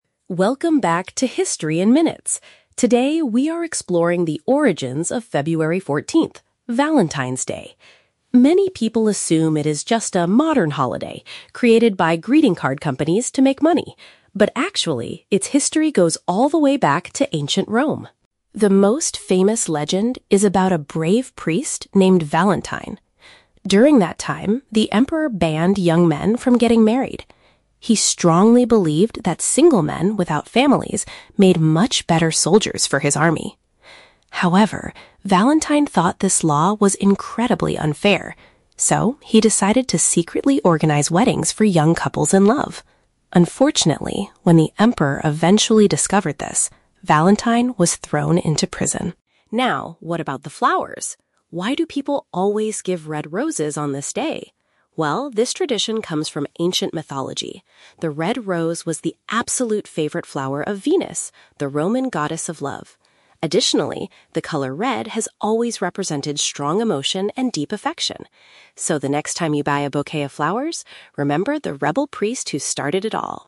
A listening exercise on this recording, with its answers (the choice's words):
Listen to a podcast episode about the history of a popular holiday and choose the correct answer (A, B, or C) for each question.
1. According to the legend, why did the Emperor forbid young men from marrying?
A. Because he wanted them to be more focused on fighting in the military.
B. Because he felt they did not have enough money to buy greeting cards.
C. Because he needed them to work as guards in the local prisons.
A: Because he wanted them to be more focused on fighting in the military.

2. What did the priest named Valentine do that was against the law?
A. He fought against the Emperor's soldiers in a public rebellion.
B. He helped romantic partners become husband and wife without the ruler knowing.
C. He started a company that sold expensive flowers to young men.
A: He helped romantic partners become husband and wife without the ruler knowing.

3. What is the historical reason behind giving red roses on this holiday?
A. They were the only plants that could survive the cold weather in ancient Rome.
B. They were traditionally used to decorate the Emperor's palace.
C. They were closely connected to a famous mythical figure representing love.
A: They were closely connected to a famous mythical figure representing love.

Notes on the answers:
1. The host says the Emperor believed that single men "made much better soldiers for his army." Option (A) uses paraphrasing ("fighting in the military" = soldiers in his army). Option (B) is a trap; "greeting card companies" are mentioned at the beginning, but not as the Emperor's reason. Option (C) is a trap; "prison" is mentioned later, but that is where Valentine was sent, not where the young men worked.
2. The podcast states that Valentine decided to "secretly organize weddings for young couples in love." Option (B) perfectly paraphrases this ("romantic partners become husband and wife" = weddings for young couples, "without the ruler knowing" = secretly). Option (A) is a trap; soldiers are mentioned, but he didn't fight them. Option (C) is a trap; companies and flowers are mentioned elsewhere in the script, but Valentine didn't sell them.
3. The host explains that the red rose was the "favorite flower of Venus, the Roman Goddess of Love." Option (C) uses synonyms ("mythical figure representing love" = Goddess of Love). Option (A) is a plausible guess for February, but weather is never mentioned. Option (B) is a trap; the "Emperor" is mentioned earlier in the story, but the roses belonged to Venus, not his palace.

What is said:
Podcast Host: Welcome back to History in Minutes. Today, we are exploring the origins of February 14th, Valentine's Day. Many people assume it is just a modern holiday created by greeting card companies to make money. But actually, its history goes all the way back to ancient Rome.
The most famous legend is about a brave priest named Valentine. During that time, the Emperor banned young men from getting married. He strongly believed that single men without families made much better soldiers for his army. However, Valentine thought this law was incredibly unfair. So, he decided to secretly organize weddings for young couples in love. Unfortunately, when the Emperor eventually discovered this, Valentine was thrown into prison.
Now, what about the flowers? Why do people always give red roses on this day? Well, this tradition comes from ancient mythology. The red rose was the absolute favorite flower of Venus, the Roman Goddess of Love. Additionally, the color red has always represented strong emotion and deep affection.